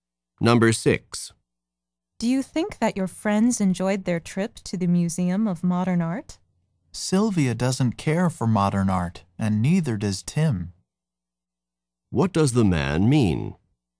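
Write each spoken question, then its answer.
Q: What does the man mean?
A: Neither Sylvia nor Tim likes modern art, so they probably didn't enjoy it.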